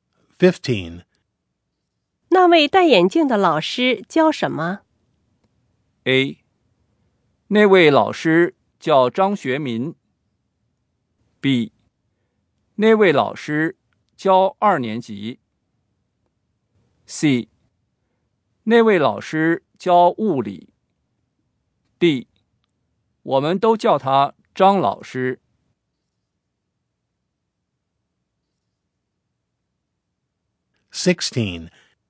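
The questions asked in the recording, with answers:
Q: 那位戴眼镜的老师教什么?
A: C: 那位老师教物理。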